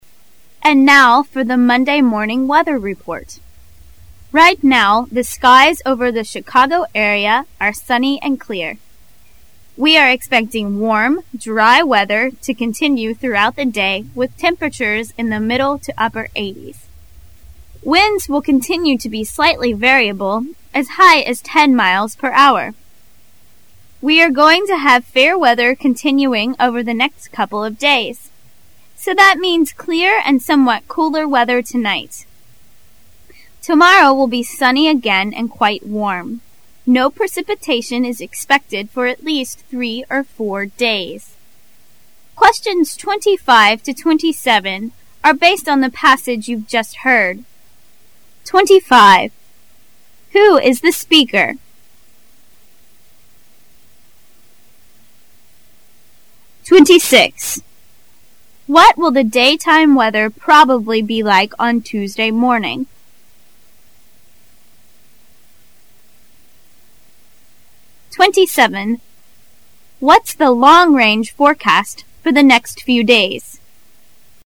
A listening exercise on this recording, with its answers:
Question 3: What's the long range forecast for the next few days?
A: Fair weather.

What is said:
[解析] 25-27 And now for the Monday Morning weather report. Right now the skies over the Chicago area are sunny and clear. We are expecting warm dry weather to continue throughout the day with temperatures in the middle to upper80' s. Winds will continue to be slightly variable as high as ten miles per hour. We are going to have fair weather con- tinning over the next couple of days so that means clear and somewhat cooler weather tonight. Tomorrow will be sunny again and quite warm. No precipitation is expected for at least three or four days. Who is the speaker?